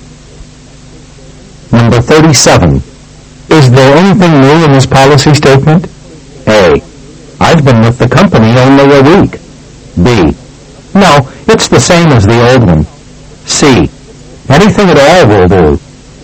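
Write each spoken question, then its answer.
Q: Is there anything new in this policy statement?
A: B: No, it's the same as the old one.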